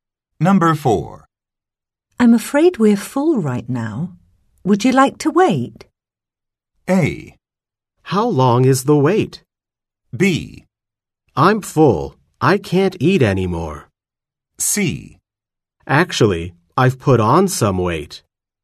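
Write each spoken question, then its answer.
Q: I'm afraid we're full right now. Would you like to wait?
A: A: How long is the wait?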